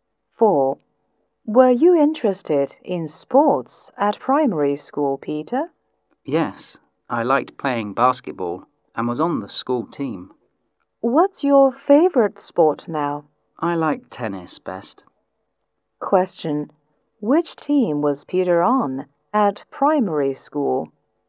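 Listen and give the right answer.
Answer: The school basketball team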